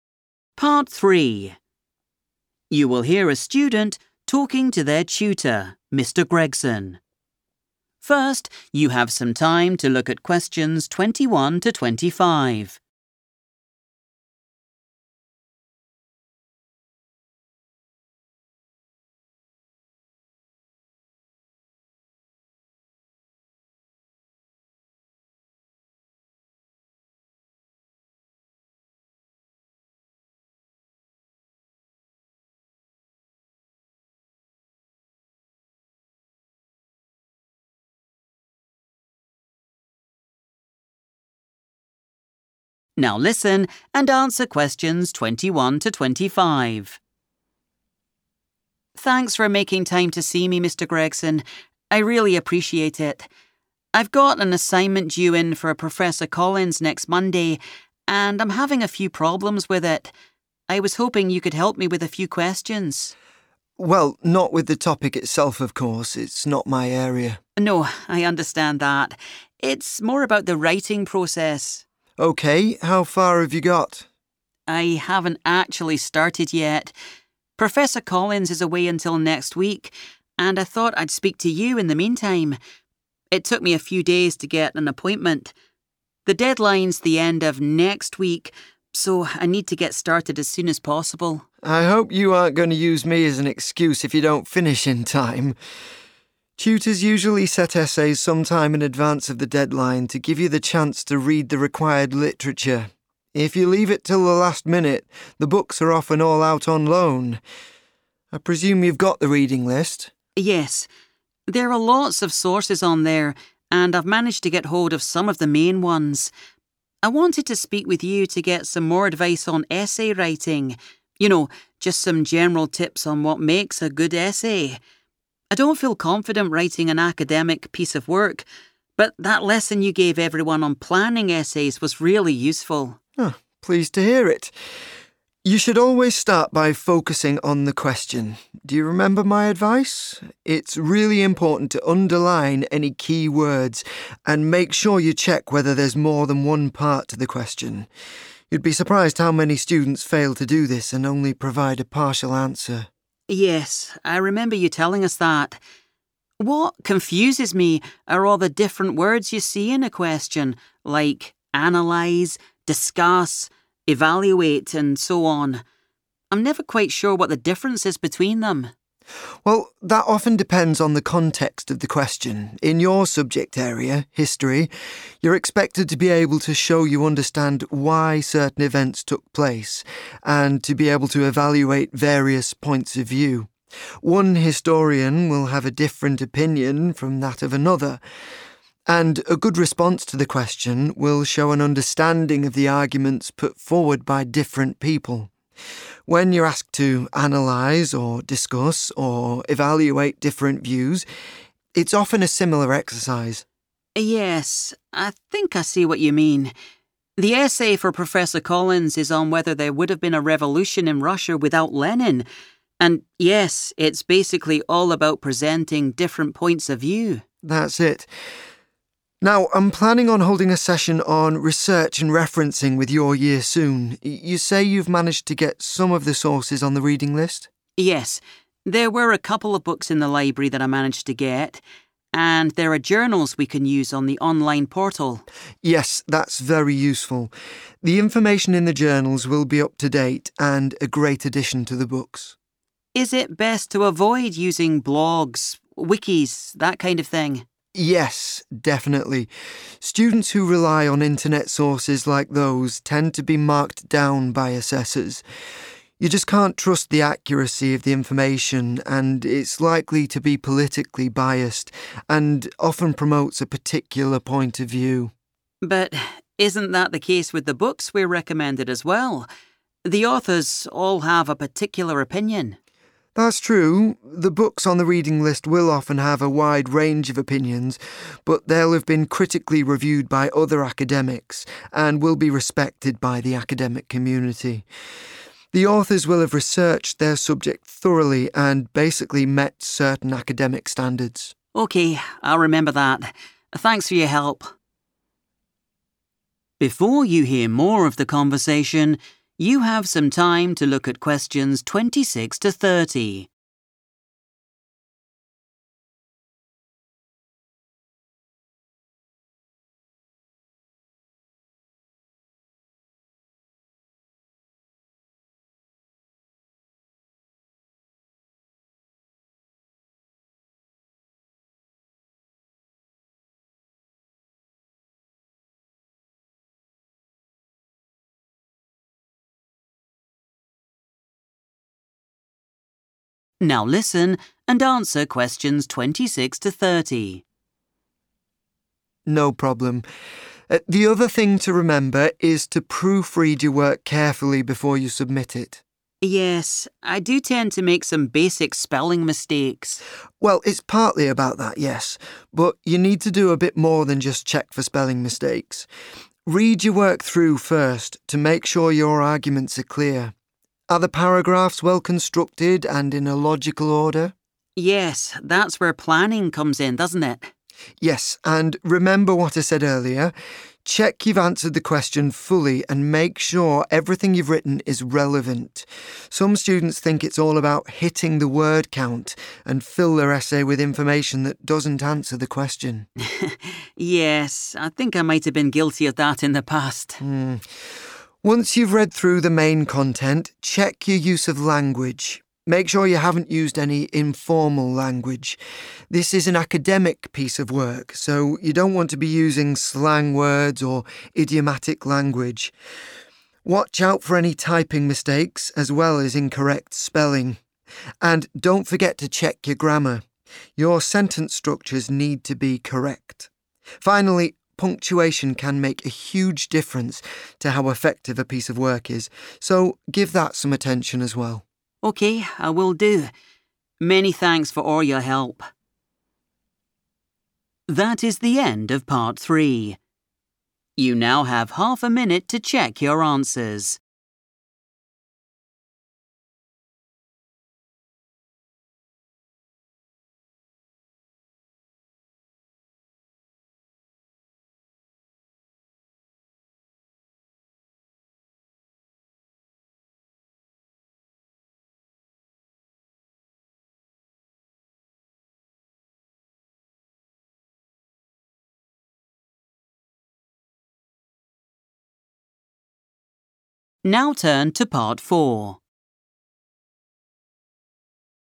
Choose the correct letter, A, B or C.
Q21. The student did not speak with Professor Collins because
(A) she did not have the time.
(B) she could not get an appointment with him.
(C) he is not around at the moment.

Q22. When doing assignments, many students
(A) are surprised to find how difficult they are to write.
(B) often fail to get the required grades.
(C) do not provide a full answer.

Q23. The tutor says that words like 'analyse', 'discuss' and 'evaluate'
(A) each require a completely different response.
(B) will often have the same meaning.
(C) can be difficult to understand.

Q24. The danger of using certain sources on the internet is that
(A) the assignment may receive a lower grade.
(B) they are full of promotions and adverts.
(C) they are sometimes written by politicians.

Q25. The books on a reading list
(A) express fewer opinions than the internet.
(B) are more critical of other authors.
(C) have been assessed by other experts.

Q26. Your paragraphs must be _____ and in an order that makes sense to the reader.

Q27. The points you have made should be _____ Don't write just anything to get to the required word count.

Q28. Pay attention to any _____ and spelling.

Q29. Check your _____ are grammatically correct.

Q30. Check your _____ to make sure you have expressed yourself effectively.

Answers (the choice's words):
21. he is not around at the moment.
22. do not provide a full answer.
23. will often have the same meaning.
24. the assignment may receive a lower grade.
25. have been assessed by other experts.
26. well constructed / well-constructed
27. relevant
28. typing mistakes
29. sentence structures
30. punctuation

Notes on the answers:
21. The correct answer is C because the student says that the professor will not return until next week. Since she needs to start her work as soon as possible, she chose to talk to a tutor instead of waiting for the professor to come back. The word 'away' is a synonym for 'not around' or absent.
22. The correct answer is C because the tutor explains that students often forget to check if a question has several parts. Because of this mistake, many students only give a 'partial answer.' In English, 'partial' is the opposite of 'full' or 'complete.' Therefore, giving a partial answer is the same as failing to provide a full answer.
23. The correct answer is B because the tutor explains that in the subject of History, using the words 'analyse', 'discuss', or 'evaluate' usually results in a 'similar exercise'. This means that even though the words are different, the task the student must complete—looking at different opinions and arguments—is basically the same.
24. The correct answer is A because the tutor explains that students who use websites like blogs and wikis often get 'marked down' by the people who grade their work. In a school setting, being 'marked down' means getting a lower grade or fewer points. The tutor explains that this happens because these internet sources are often 'politically biased' (meaning they show only one point of view) and might contain wrong information.
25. The correct answer is C because the tutor explains that books on the reading list are trustworthy. Unlike common internet sources, these books have been 'critically reviewed'—which means assessed or checked carefully—by 'academics,' who are experts in the university community. This process ensures the information is accurate and meets high academic standards.
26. The correct answer is identified when the tutor explains how to check an essay after writing it. The tutor suggests that a student should look at their paragraphs to see if they are "well constructed" and organized in a "logical order." This matches the part of the checklist that asks for paragraphs to be in an order that makes sense to the reader.
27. The correct answer is "relevant" because the tutor specifically tells the student to check that every point they write is important for answering the question. He explains that students should avoid adding extra, useless information just to reach the required "word count."
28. The correct answer is determined by the tutor's specific advice on what to check during the proofreading process. He lists several things for the student to look for, specifically grouping keyboard errors together with spelling. In the transcript, he explicitly tells the student to 'Watch out for any typing mistakes as well as incorrect spelling,' which matches the sentence structure of the task.
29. The correct answer is chosen because the tutor gives proofreading advice at the end of the meeting. He tells the student to look at their grammar and expressly mentions that "sentence structures" must be correct. This fits the blank in the checklist about checking things that must be grammatically correct.
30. The correct answer is punctuation because the tutor mentions it as the final step in the proofreading process. He explains that it significantly changes how successful or 'effective' the writing is. In the checklist, the student is told to check it to ensure they expressed themselves 'effectively', which exactly matches the tutor's advice about punctuation making a piece of work effective.

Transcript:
Student: Thanks for making time to see me, Mr Gregson. I really appreciate it. I've got an assignment due in for Professor Collins next Monday and I'm having a few problems with it. I was hoping you could help me with a few questions.
Tutor: Well, not with the topic itself, of course. It's not my area.
Student: No, I understand that. It's more about the writing process.
Tutor: OK, how far have you got?
Student: I haven't actually started yet. Professor Collins is away until next week and I thought I'd speak to you in the meantime. It took me a few days to get an appointment. The deadline's the end of next week so I need to get started as soon as possible.
Tutor: I hope you aren't going to use me as an excuse if you don't finish in time. Tutors usually set essays some time in advance of the deadline to give you the chance to read the required literature. If you leave it till the last minute, the books are often all out on loan. I presume you've got the reading list?
Student: Yes, there are lots of sources on there and I've managed to get hold of some of the main ones. I wanted to speak with you to get some more advice on essay writing. You know, just some general tips on what makes a good essay. I don't feel confident writing an academic piece of work but that lesson you gave everyone on planning essays was really useful.
Tutor: Pleased to hear it. You should always start by focusing on the question. Do you remember my advice? It's really important to underline any key words and make sure you check whether there's more than one part to the question. You'd be surprised how many students fail to do this and only provide a partial answer.
Student: Yes, I remember you telling us that. What confuses me are all the different words you see in a question, like 'analyse', 'discuss', 'evaluate', and so on. I'm never quite sure what the difference is between them.
Tutor: Well, that often depends on the context of the question. In your subject area, History, you're expected to be able to show you understand why certain events took place and to be able to evaluate various points of view. One historian will have a different opinion from that of another, and a good response to the question will show an understanding of the arguments put forward by different people. When you're asked to analyse or discuss or evaluate different views, it's often a similar exercise.
Student: Yes, I think I see what you mean. The essay for Professor Collins is on whether there would have been a revolution in Russia without Lenin, and yes, it's basically all about presenting different points of view.
Tutor: That's it. Now, I'm planning on holding a session on research and referencing with your year soon. You say you've managed to get some of the sources on the reading list?
Student: Yes, there were a couple of books in the library that I managed to get. And there are journals we can use on the online portal.
Tutor: Yes, that's very useful. The information in the journals will be up to date and a great addition to the books.
Student: Is it best to avoid using blogs, wikis, that kind of thing?
Tutor: Yes, definitely. Students who rely on internet sources like those tend to be marked down by assessors. You just can't trust the accuracy of the information and it's likely to be politically biased and often promotes a particular point of view
Student: But isn't that the case with the books we're recommended as well? The authors all have a particular opinion.
Tutor: That's true. The books on the reading list will often have a wide range of opinions but they'll have been critically reviewed by other academics and will be respected by the academic community. The authors will have researched their subject thoroughly and basically met certain academic standards.
Student: OK, I'll remember that. Thanks for your help.
Tutor: No problem. The other thing to remember is to proofread your work carefully before you submit it.
Student: Yes, I do tend to make some basic spelling mistakes.
Tutor: Well, it's partly about that, yes, but you need to do a bit more than just check for spelling mistakes. Read your work through first to make sure your arguments are clear. Are the paragraphs well constructed and in a logical order?
Student: Yes, that's where planning comes in, doesn't it?
Tutor: Yes, and remember what I said earlier. Check you've answered the question fully and make sure everything you've written is relevant. Some students think it's all about hitting the word count and fill their essay with information that doesn't answer the question.
Student: Yes, I think I might have been guilty of that in the past.
Tutor: Once you've read through the main content, check your use of language. Make sure you haven't used any informal language. This is an academic piece of work so you don't want to be using slang words or idiomatic language. Watch out for any typing mistakes as well as incorrect spelling. And don't forget to check your grammar: your sentence structures need to be correct. Finally, punctuation can make a huge difference to how effective a piece of work is so give that some attention as well.
Student: OK, I will do. Many thanks for all your help.